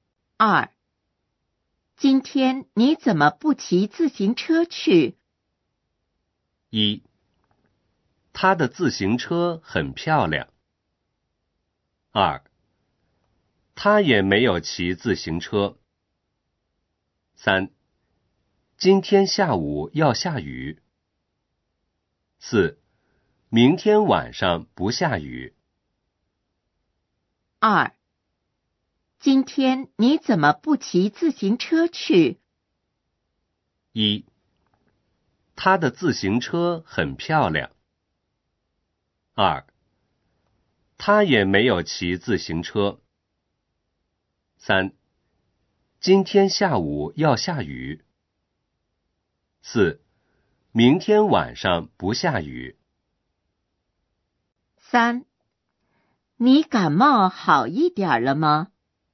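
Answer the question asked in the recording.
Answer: 3: 今天下午要下雨。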